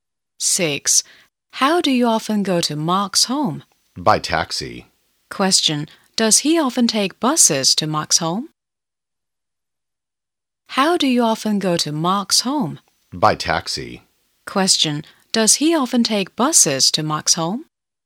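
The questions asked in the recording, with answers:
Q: does he often take buses to Mark's home?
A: No, he often goes by taxi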